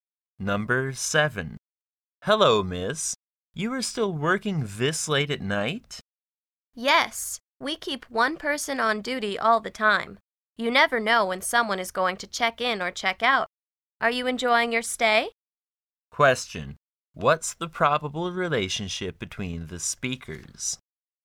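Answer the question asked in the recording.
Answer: Hotel clerk and guest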